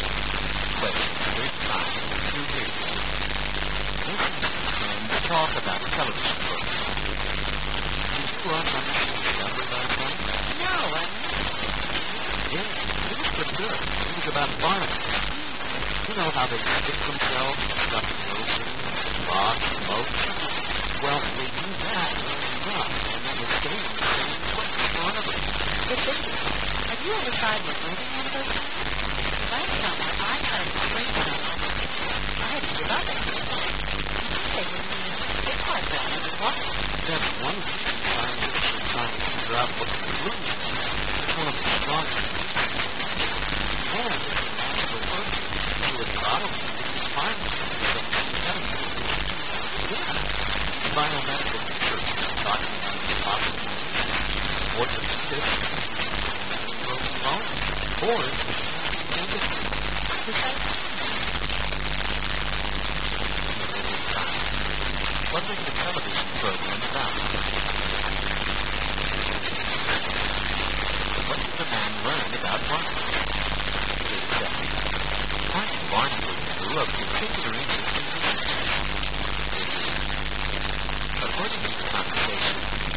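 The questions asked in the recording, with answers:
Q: What is the television program about?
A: Barnacles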